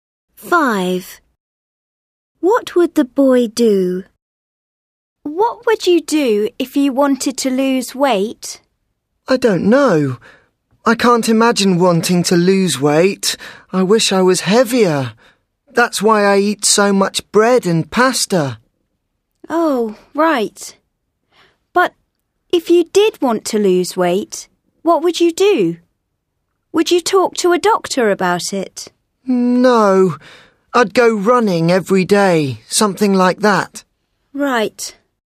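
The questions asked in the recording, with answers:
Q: What would the boy do?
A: Go running every day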